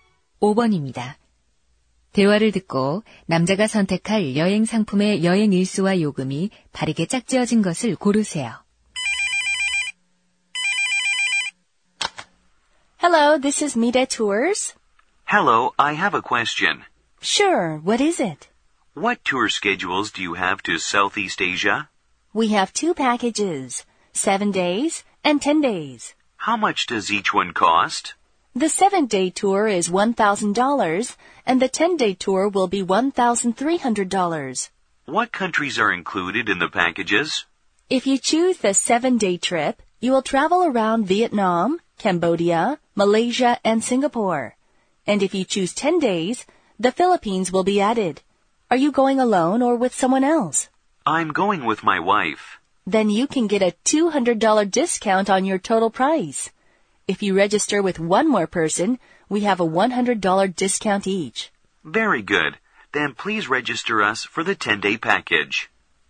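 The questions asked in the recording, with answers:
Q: 대화를 듣고 남자가 선택할 여행 상품의 여행 일수와 요금이 바르게 짝지어진 것을 고르세요.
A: 10일, 2,400달러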